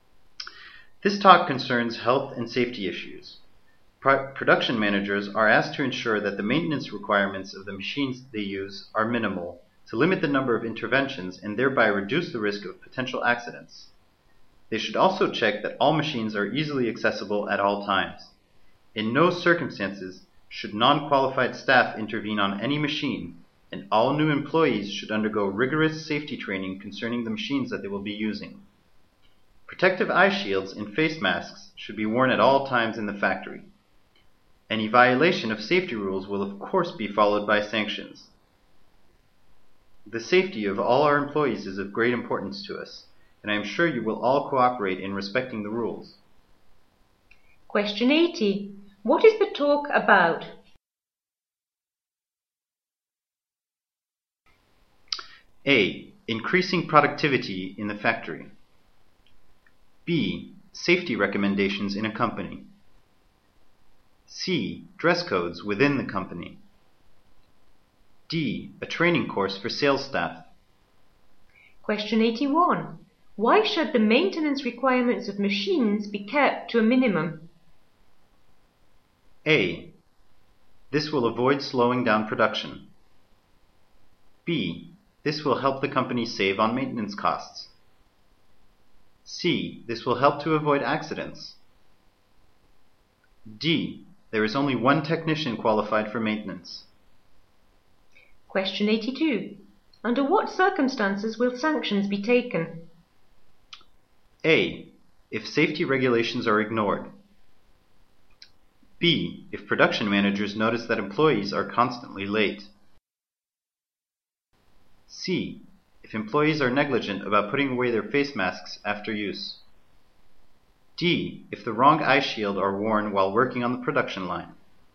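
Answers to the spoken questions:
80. B: Safety recommendations in a company.
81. C: This will help to avoid accidents.
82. A: If safety regulations are ignored.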